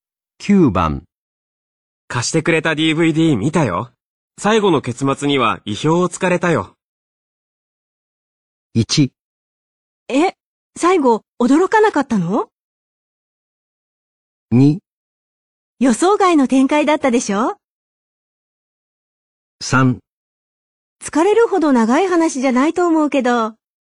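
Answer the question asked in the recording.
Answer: 2: 予想外の展開だったでしょ?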